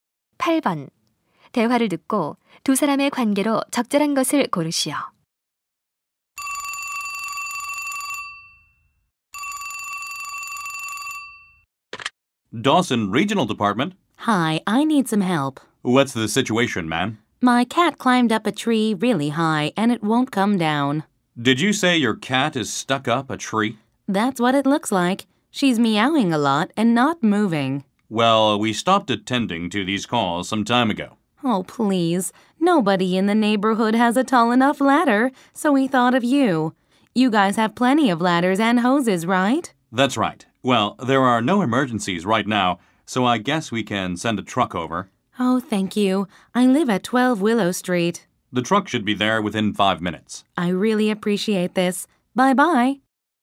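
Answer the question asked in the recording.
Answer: 소방관 - 신고자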